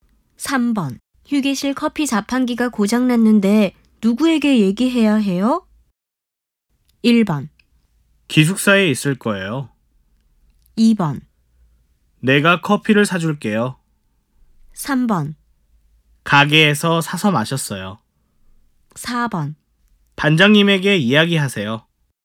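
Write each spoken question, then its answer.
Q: 휴게실 커피 자판기가 고장났는데 누구에게 얘기해야 해요?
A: 4: 반장님에게 이야기하세요.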